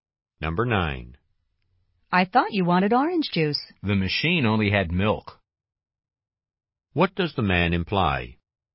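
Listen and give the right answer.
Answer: He got milk because the machine had no orange juice.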